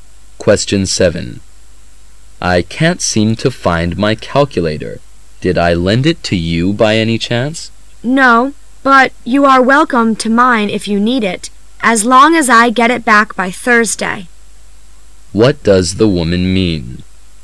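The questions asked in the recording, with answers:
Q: What does the woman mean?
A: She will lend him her calculator if he returns it by Thursday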